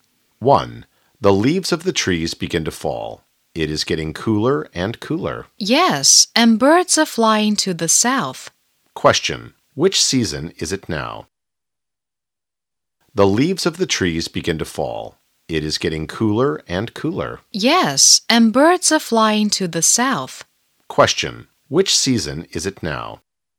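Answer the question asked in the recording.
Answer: Autumn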